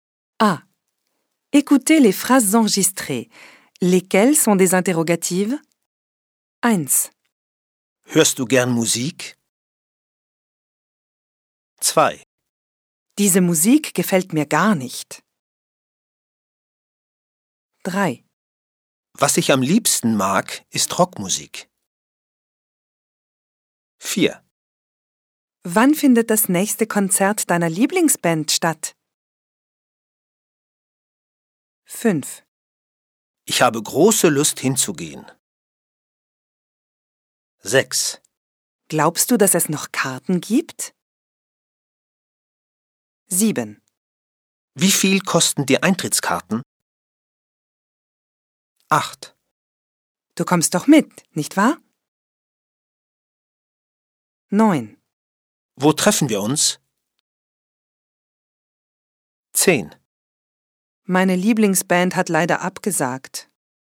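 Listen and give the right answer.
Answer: 1, 4, 6, 7, 8, 9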